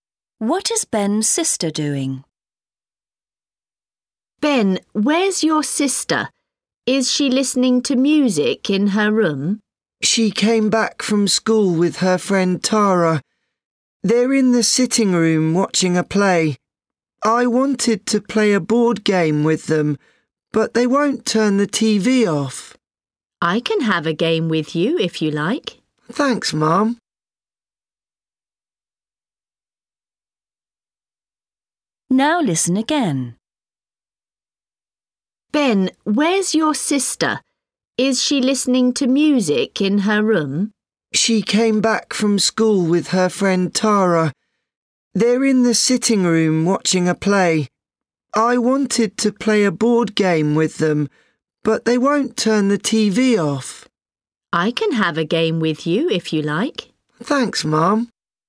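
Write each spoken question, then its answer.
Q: What is Ben's sister doing?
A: watching a play on TV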